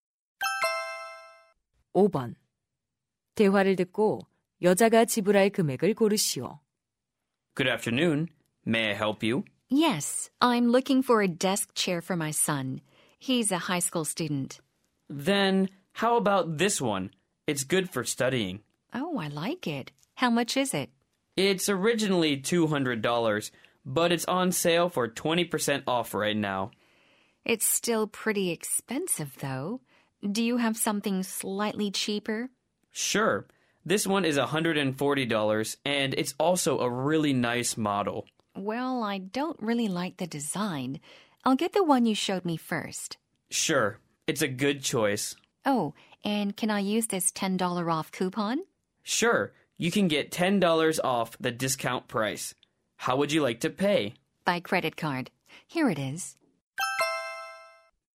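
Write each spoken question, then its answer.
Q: 대화를 듣고 여자가 지불할 금액을 고르시오.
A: 150달러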